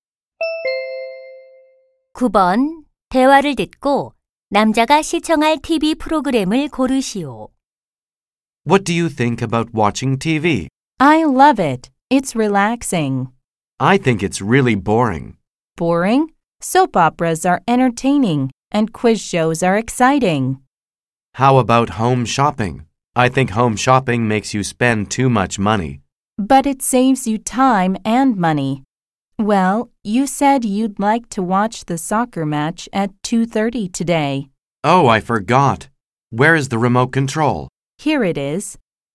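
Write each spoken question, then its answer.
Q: 대화를 듣고 남자가 시청할 TV 프로그램을 고르시오.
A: 축구 경기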